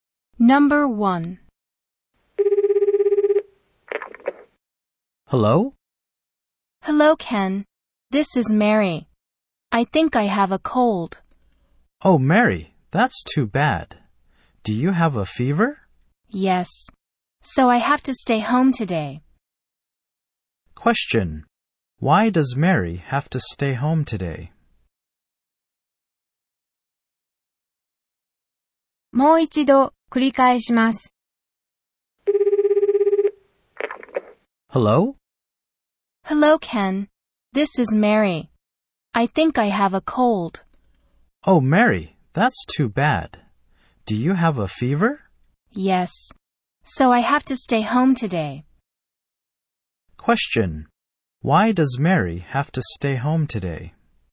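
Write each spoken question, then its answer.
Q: Why does Mary have to stay home today?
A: Because she has a fever (a cold).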